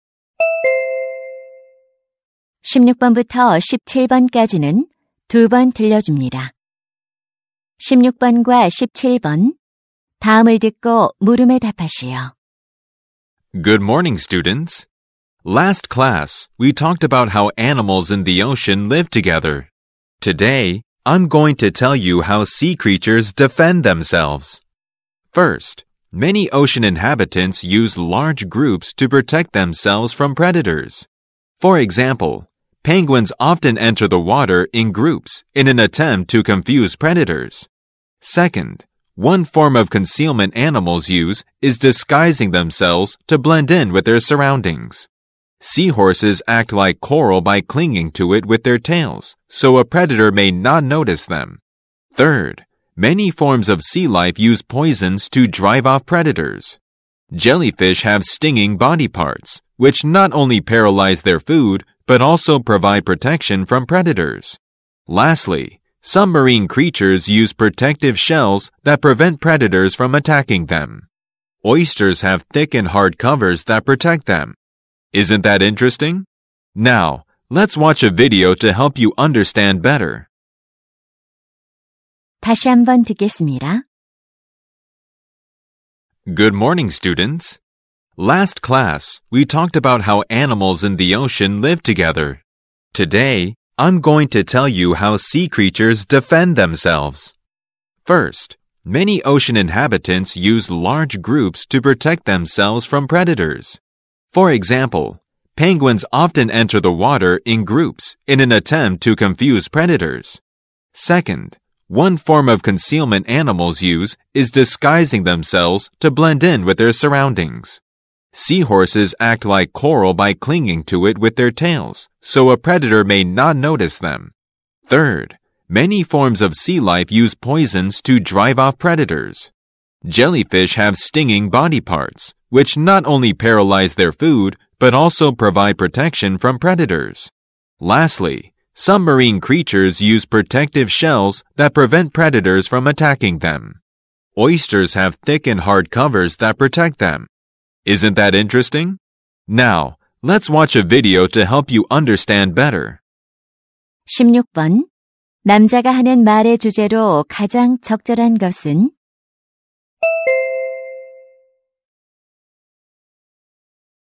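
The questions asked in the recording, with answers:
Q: 남자가 하는 말의 주제로 가장 적절한 것은?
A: 해양 생물이 스스로를 방어하는 방법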